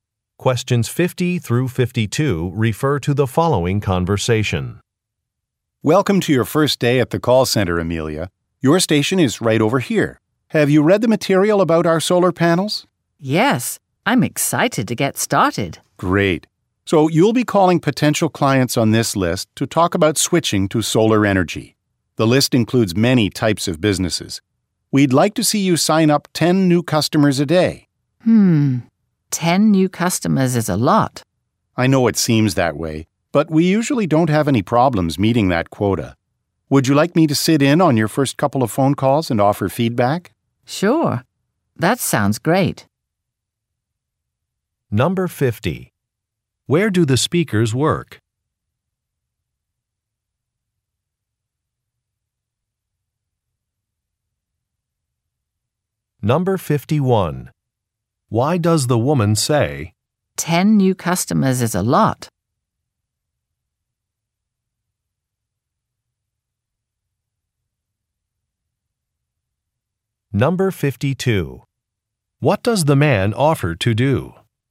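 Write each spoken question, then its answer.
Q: Where do the speakers work?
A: At a call center for solar panels

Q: Why does the woman say,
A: She is concerned the goal is too high

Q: What does the man offer to do?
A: Sit in on her first calls and give feedback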